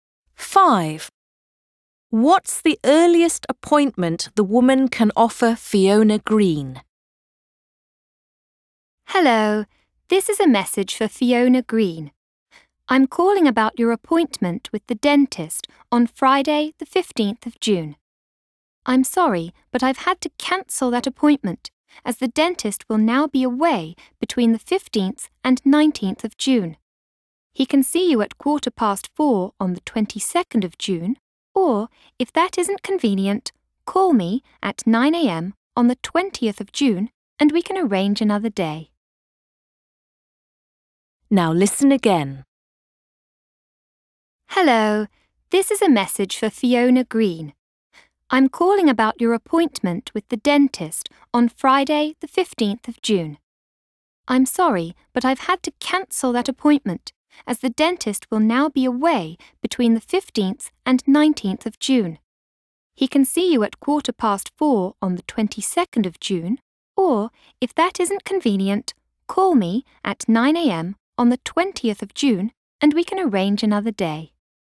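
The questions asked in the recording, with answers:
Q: What's the earliest appointment the woman can offer Fiona Green?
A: 4:15 on the 22nd of June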